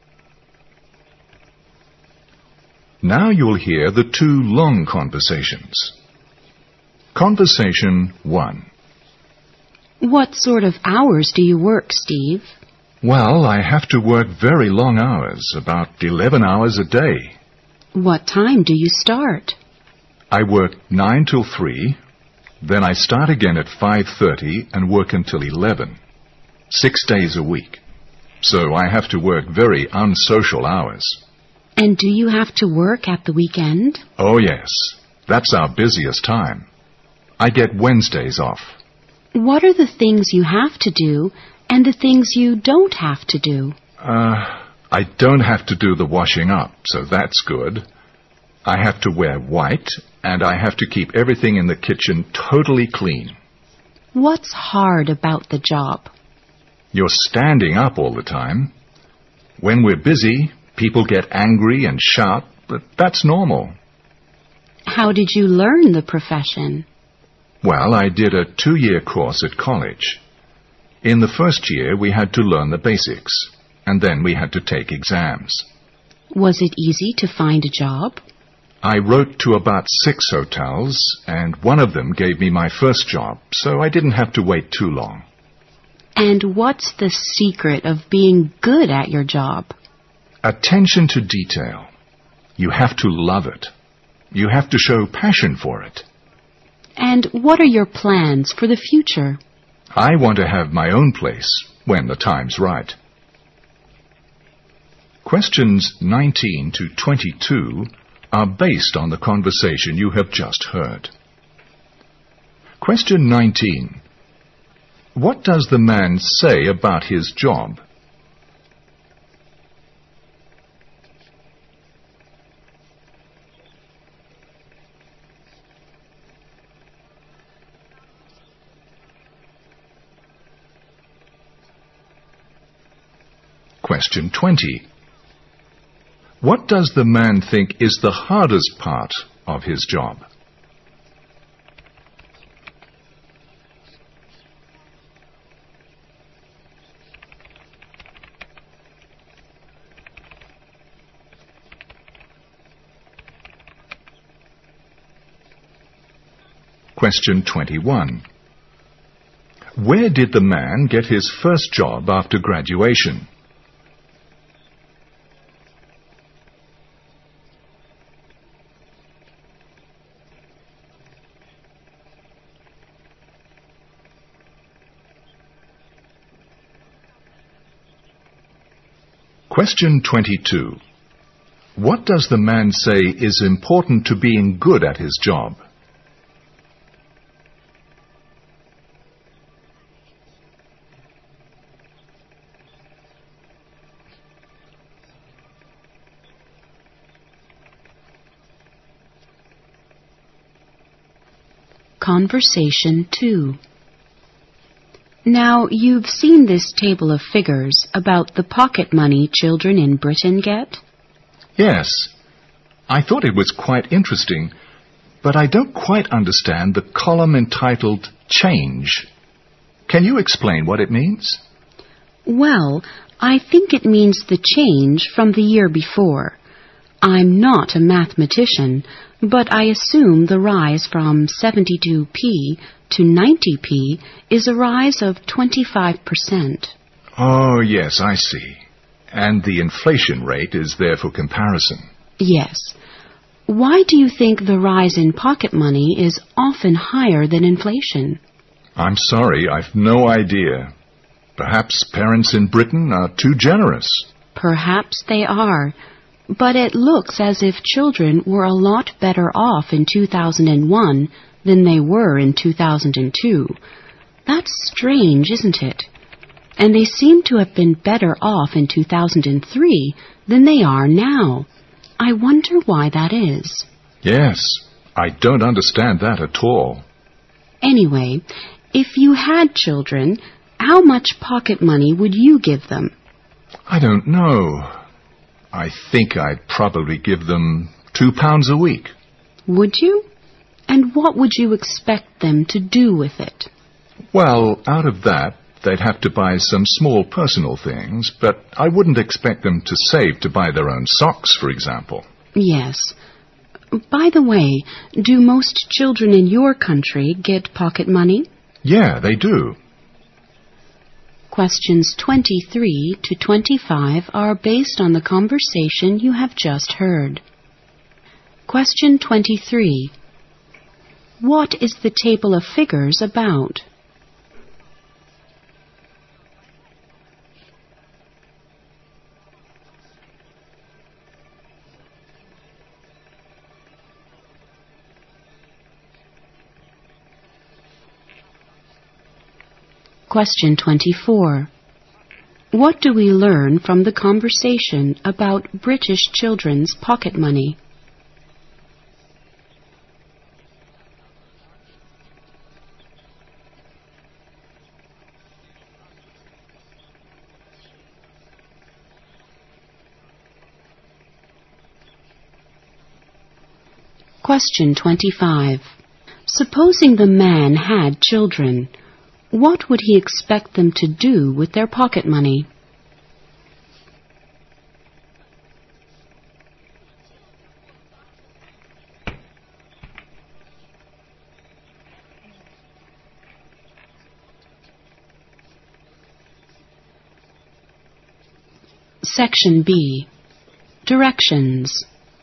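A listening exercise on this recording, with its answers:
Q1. What does the man say about his job?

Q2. What does the man think is the hardest part of his job?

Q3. Where did the man get his first job after graduation?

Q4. What does the man say is important to being good at his job?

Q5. What is the table of figures about?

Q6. What do we learn from the conversation about British children's pocket money?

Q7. Supposing the man had children, what would he expect them to do with their pocket money?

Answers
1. He works long, unsocial hours.
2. Standing up all the time.
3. In a hotel.
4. Attention to detail.
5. The pocket money British children get.
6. It often rises faster than inflation.
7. Buy some small personal things.

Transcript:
Long Conversations
Conversation 1
W: What sort of hours do you work, Steve?
M: Well I have to work very long hours, about eleven hours a day。
W: What time do you start?
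M: I work 9 to 3, then I start again at 5:30 and work until 11, six days a week.
W: And do you have to work at the weekend?
M: Oh, yes, that's our busiest time. I get Wednesdays off。
W: What are the things you have to do and the things you don't have to do?
M: Uh, I don't have to do the washing-up, so that's good. I have to wear white, and I have to keep everything in the kitchen totally clean。
W: What's hard about the job?
M: You are standing up all the time. When we are busy, people get angry and sharp, but that's normal。
W: How did you learn the profession?
M: Well, I did a two-year course at college. In the first year we had to learn the basics, and then we had to take exams。
W: Was it easy to find a job?
M: I wrote to about six hotels and one of them gave me my first job, so I didn't have to wait too long。
W: And what's the secret of being good at your job?
M: Attention to detail. You have to love it. 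You have to show passion for it。
W: And what are your plans for the future?
M: I want to have my own place when the time is right。
Q 20. What does the man think is the hardest part of his job?
Q 21. Where did the man get his first job after graduation?
Q 22. What does the man say is important to being good at his job?
Conversation 2
W: Now you've seen this table of figures about the pocket money children in Britain get?
M: Yes. I thought it was quite interesting, but I don't quite understand the column entitled change. Can you explain what it means?
W: Well, I think it means the change from the year before. I am not a mathematician, but I assume the rise from 70p to 90p is a rise of 25 percent。
M: Oh yes, I see. And the inflation rate is there for comparison。
W: Yes. why do you think the rise in pocket money is often higher than inflation?
M: I am sorry I've no idea. Perhaps parents in Britain are too generous。
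W: Perhaps they are. But it looks as if children were not better off in 2001 than they were in 2002. That's strange, isn't it? And they seem to have been better off in 2003 than they are now. I wonder why that is。
M: Yes, I don't understand that at all。
W: Anyway, if you had children, how much pocket money would you give them?
M: I don't know. I think I'll probably give them 2 pounds a week。
W: Would you? And what would you expect them to do with it?
M: Well, out of that, they have to buy some small personal things, but I wouldn't expect them to save to buy their own socks, for example。
W: Yes, by the way, do most children in your country get pocket money?
M: Yeah, they do。
Q23 What is the table of figures about?
Q24 What do we learn from the conversation about British children's pocket money?
Q25 Supposing the man had children, what would he expect them to do with their pocket money?

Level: 四级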